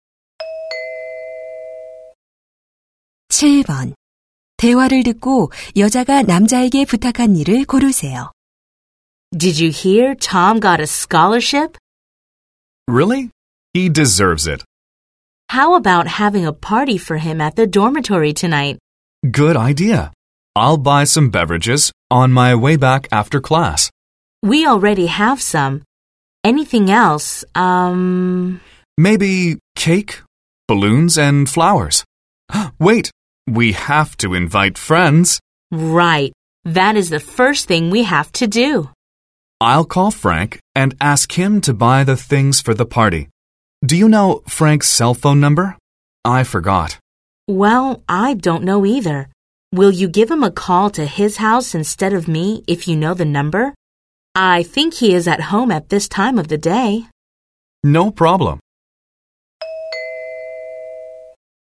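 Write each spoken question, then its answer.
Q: 대화를 듣고 여자가 남자에게 부탁한 일을 고르세요.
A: Frank의 집으로 전화하기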